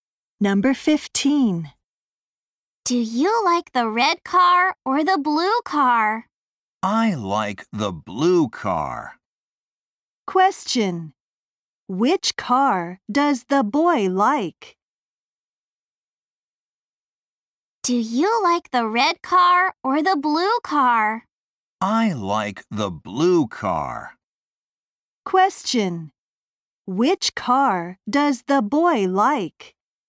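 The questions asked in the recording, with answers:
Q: Question. Which car does the boy like?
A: The blue car.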